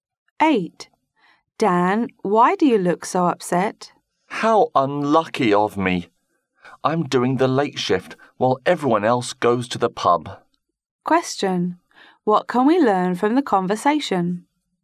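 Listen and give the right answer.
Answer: Dan has to work the late shift while the others go to the pub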